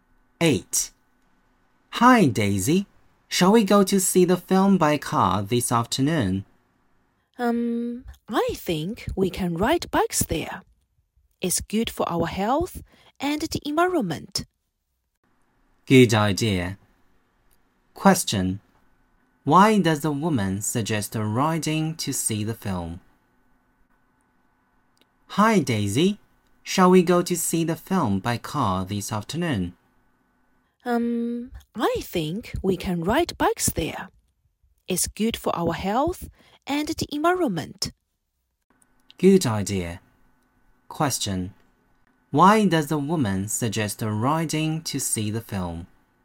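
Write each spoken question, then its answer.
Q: Why does the woman suggest riding to see the film?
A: It's good for their health and the environment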